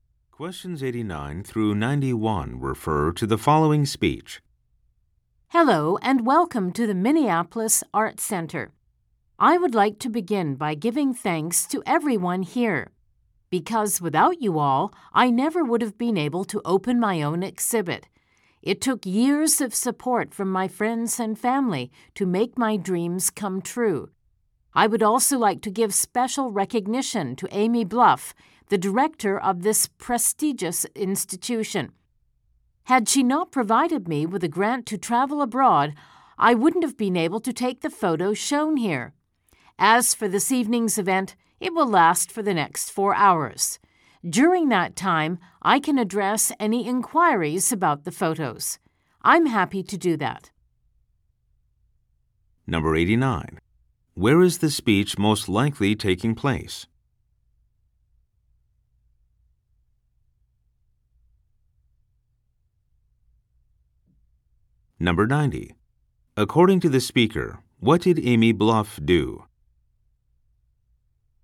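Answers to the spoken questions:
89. At a photo exhibit in an art center
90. She gave the speaker a grant to travel abroad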